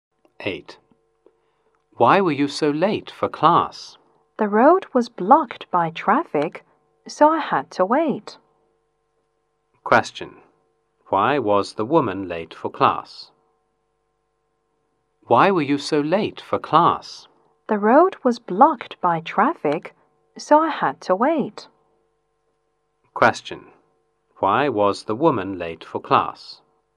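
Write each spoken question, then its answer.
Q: Why was the woman late for class?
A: The road was blocked by traffic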